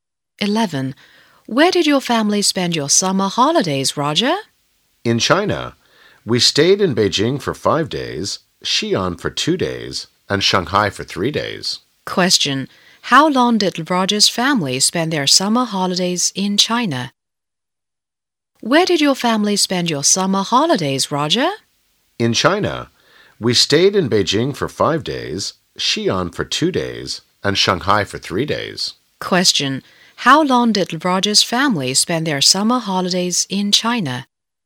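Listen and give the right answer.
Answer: 10 days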